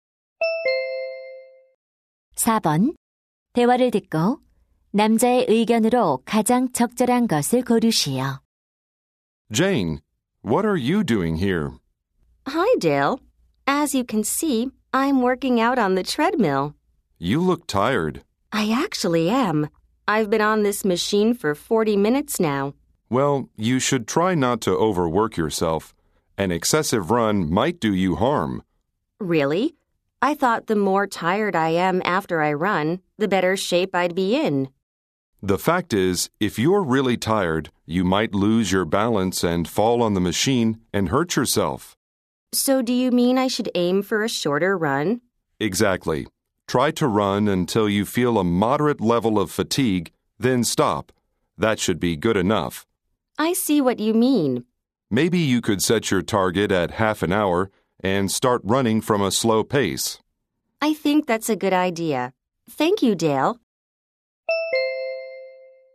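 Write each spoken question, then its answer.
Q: 대화를 듣고 남자의 의견으로 가장 적절한 것을 고르시오.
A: 지나치게 오래 달리지 말고 적당히 피로할 때까지만 운동해야 한다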